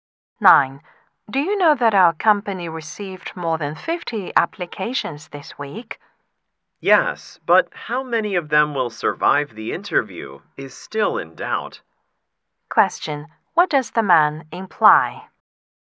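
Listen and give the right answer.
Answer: It is not certain how many applicants will pass the interview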